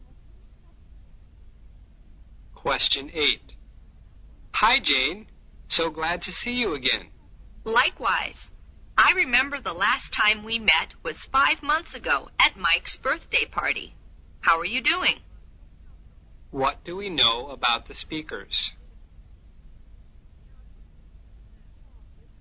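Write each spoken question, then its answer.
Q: What do we know about the speakers?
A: They haven't seen each other for 5 months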